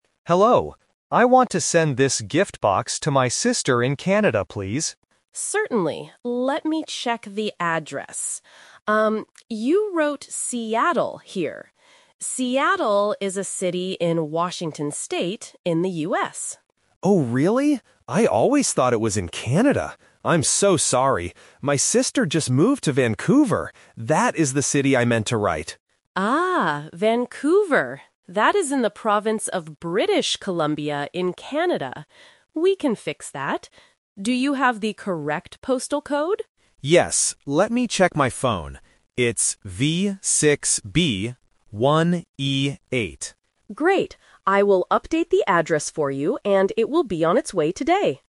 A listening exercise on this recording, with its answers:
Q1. Where does the customer's sister actually live?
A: In Vancouver

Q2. What mistake did the customer make on the box?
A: He wrote a city in the US.

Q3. What does the clerk ask the customer for at the end?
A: The postal code.

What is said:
Customer: Hello. I want to send this gift box to my sister in Canada, please.
Clerk: Certainly. Let me check the address. Um, you wrote "Seattle" here. Seattle is a city in Washington State, in the US.
Customer: Oh, really? I always thought it was in Canada! I'm so sorry, my sister just moved to Vancouver. That is the city I meant to write.
Clerk: Ah, Vancouver. That is in the province of British Columbia in Canada. We can fix that. Do you have the correct postal code?